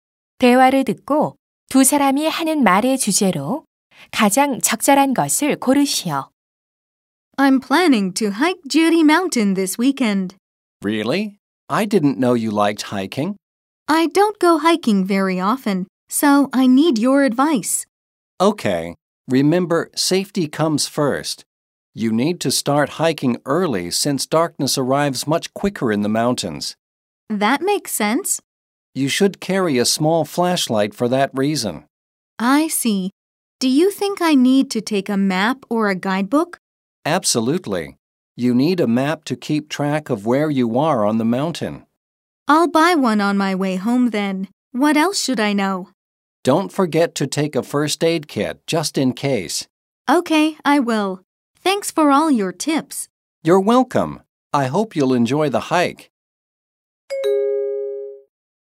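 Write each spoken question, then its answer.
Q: 대화를 듣고 두 사람이 하는 말의 주제로 가장 적절한 것을 고르시오.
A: 등산할 때 지켜야 할 안전 수칙과 준비물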